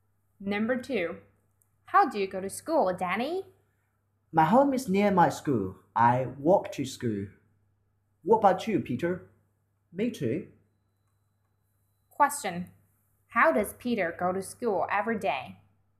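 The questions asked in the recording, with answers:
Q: Question. How does Peter go to school every day?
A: He walks to school.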